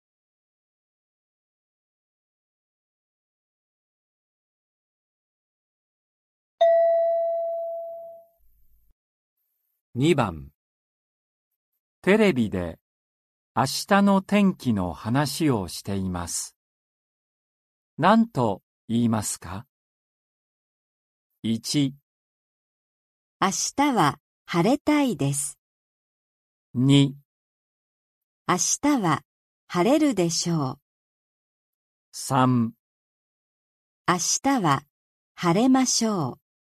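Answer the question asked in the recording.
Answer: 2: 明日は晴れるでしょう。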